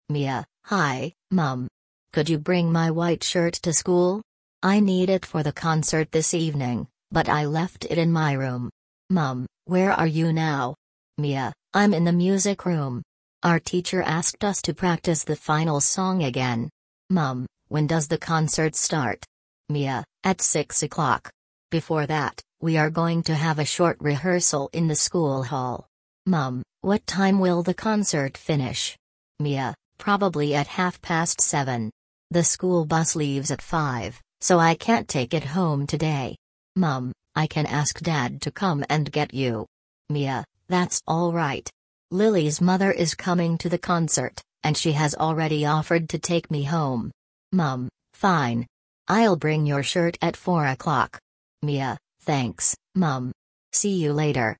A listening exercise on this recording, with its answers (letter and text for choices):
Ты услышишь диалог. Для каждого предложения А–Е выбери один правильный вариант ответа из трёх предложенных: 1, 2 или 3. Ты услышишь текст дважды.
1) Why is Mia calling her mother?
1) She wants permission to visit a friend.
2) She needs something for the school concert.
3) She wants her mother to buy a new dress.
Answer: 2) She needs something for the school concert.

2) Where is Mia now?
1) In the school hall.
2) In the music room.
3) In her classroom.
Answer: 2) In the music room.

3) What will the pupils do before the concert?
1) Have a short rehearsal.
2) Decorate the school hall.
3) Eat together in the café.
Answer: 1) Have a short rehearsal.

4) Why can't Mia go home on the school bus?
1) She has lost her bus ticket.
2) The bus leaves before the concert ends.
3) The bus does not run in the evening.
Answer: 2) The bus leaves before the concert ends.

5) Who will take Mia home?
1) Her music teacher.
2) Her friend's mother.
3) Her father.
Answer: 2) Her friend's mother.

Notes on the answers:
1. Mia просит маму принести белую рубашку, которая нужна ей для школьного концерта.
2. Во время разговора Mia находится в музыкальном классе.
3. Перед концертом ученики проведут короткую репетицию.
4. Автобус отправляется в пять часов, а концерт заканчивается значительно позже.
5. Домой Mia отвезёт мама её подруги Lily.

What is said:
Mia: Hi, Mum. Could you bring my white shirt to school? I need it for the concert this evening, but I left it in my room.
Mum: Where are you now?
Mia: I'm in the music room. Our teacher asked us to practise the final song again.
Mum: When does the concert start?
Mia: At six o'clock. Before that, we are going to have a short rehearsal in the school hall.
Mum: What time will the concert finish?
Mia: Probably at half past seven. The school bus leaves at five, so I can't take it home today.
Mum: I can ask Dad to come and get you.
Mia: That's all right. Lily's mother is coming to the concert, and she has already offered to take me home.
Mum: Fine. I'll bring your shirt at four o'clock.
Mia: Thanks, Mum. See you later!